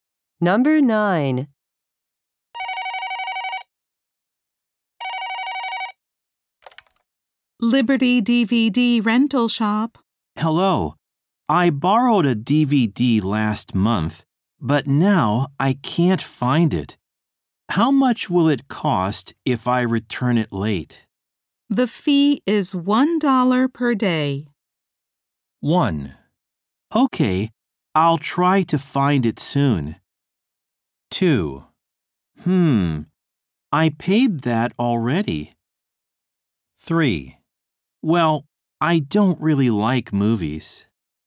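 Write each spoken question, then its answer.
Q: The fee is $1 per day.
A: 1: Okay, I'll try to find it soon.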